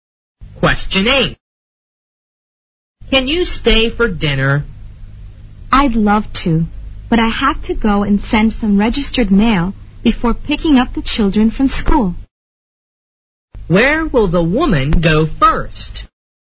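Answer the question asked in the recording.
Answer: The post office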